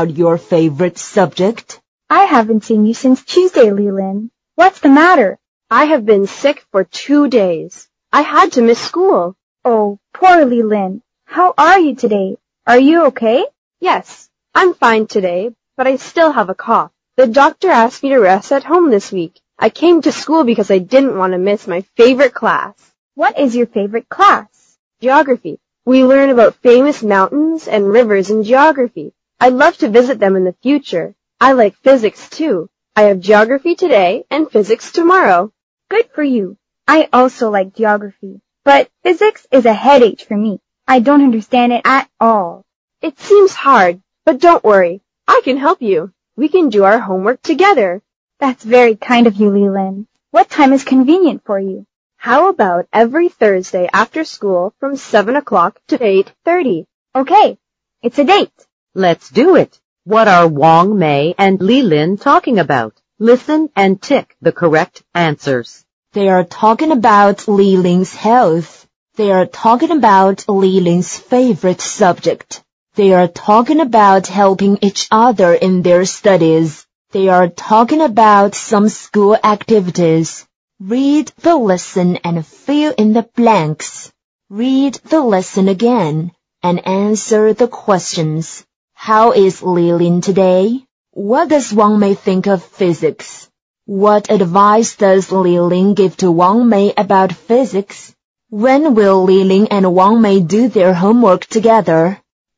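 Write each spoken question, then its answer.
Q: How is Lilin today?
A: She's fine but still has a cough.

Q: What does Wang Mei think of physics?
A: It's a headache; she doesn't understand it at all.

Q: What advice does Lilin give to Wang Mei about physics?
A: Don't worry; they can do homework together.

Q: When will Lilin and Wang Mei do their homework together?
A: Every Thursday after school from 7 to 8:30.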